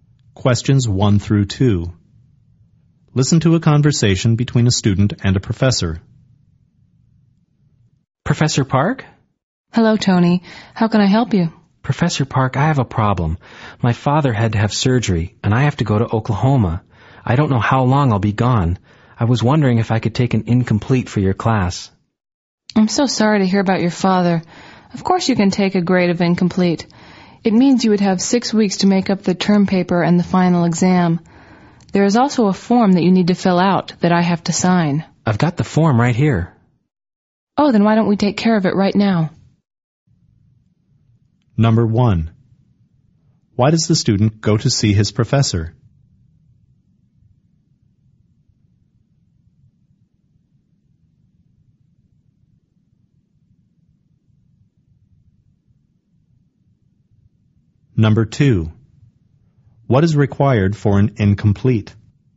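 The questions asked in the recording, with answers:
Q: Why does the student go to see his professor?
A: To ask to take an incomplete because his father needs surgery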